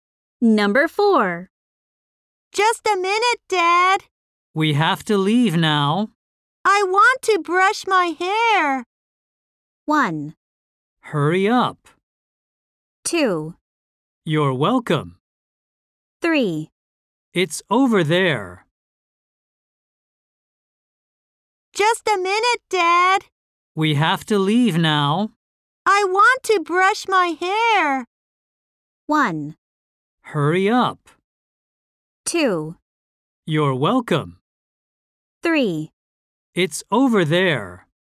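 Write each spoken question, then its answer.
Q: I want to brush my hair.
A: 1: Hurry up.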